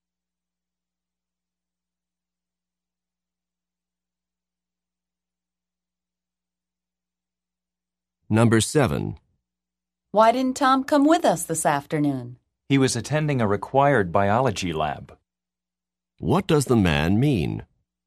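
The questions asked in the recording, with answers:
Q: What does the man mean?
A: Tom had to attend a required biology lab.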